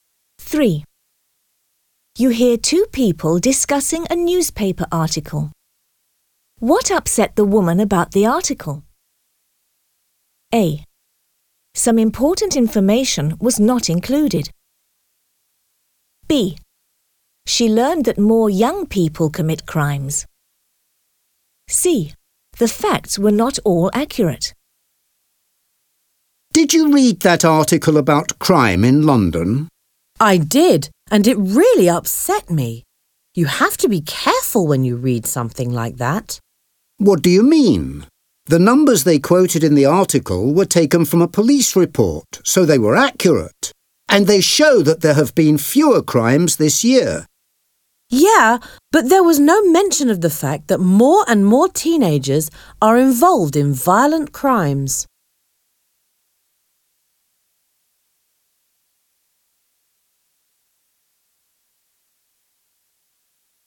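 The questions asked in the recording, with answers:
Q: What upset the woman about the article?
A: A: Some important information was not included.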